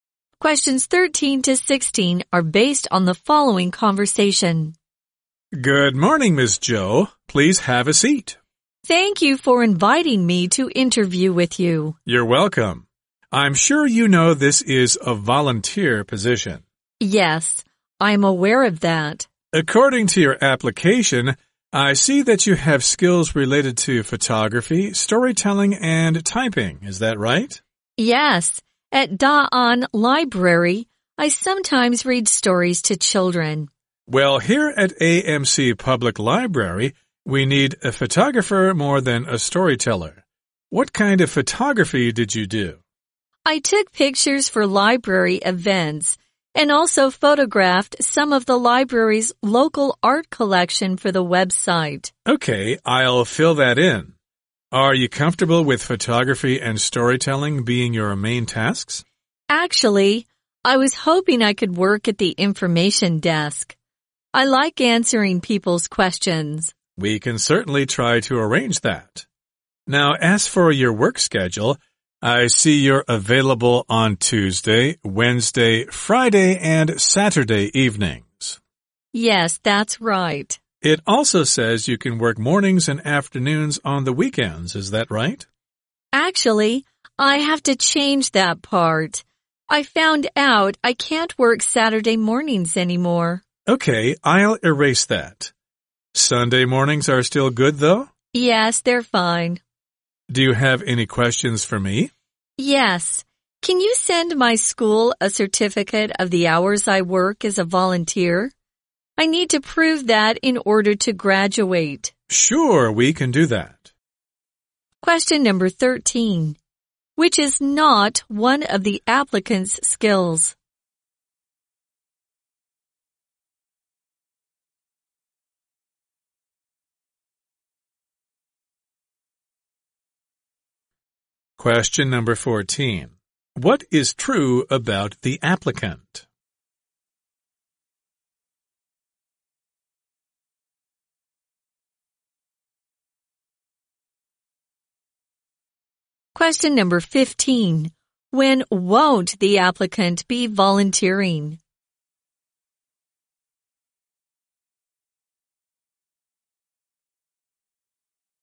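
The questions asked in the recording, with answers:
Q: When won't the applicant be volunteering?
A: Saturday mornings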